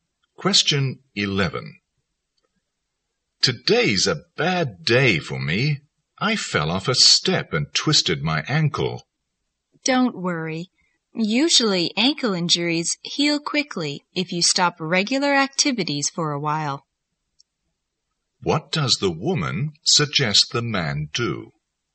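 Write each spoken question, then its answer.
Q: What does the woman suggest the man do?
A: Stop regular activities for a while to let his ankle heal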